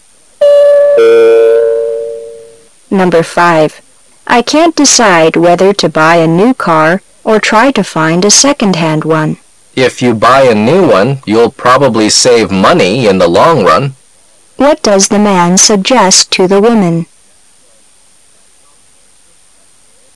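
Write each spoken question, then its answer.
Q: What does the man suggest to the woman?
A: Buy a new car.

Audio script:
[解析] W: I can't decide whether to buy a new car or try to find a second-hand one. M: If you buy a new one, you'll probably save money in the long run. Q: What does the man suggest to the woman?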